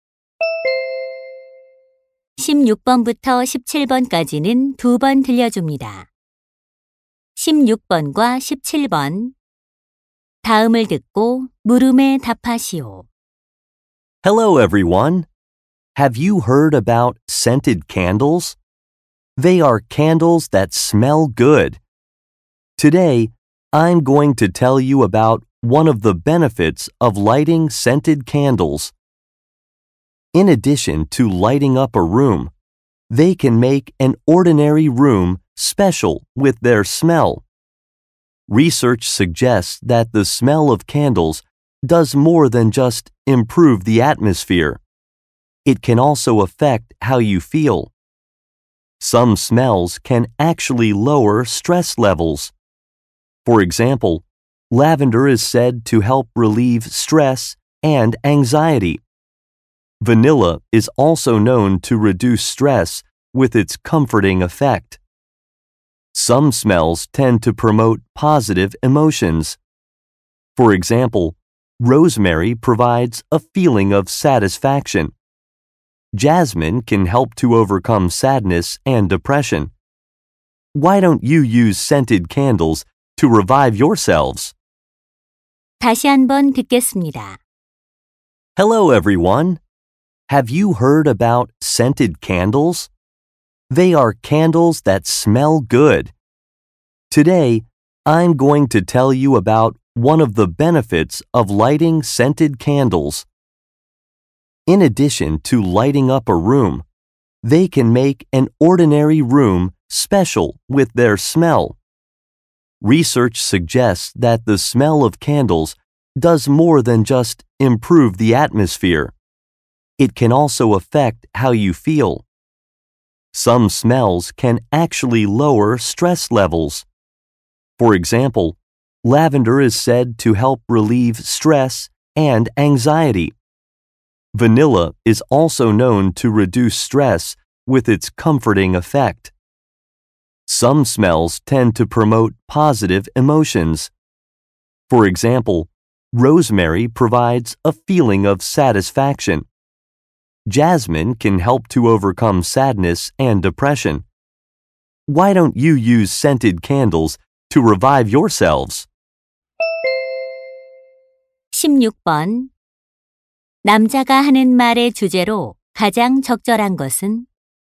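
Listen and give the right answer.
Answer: 향초의 향이 감정에 미치는 영향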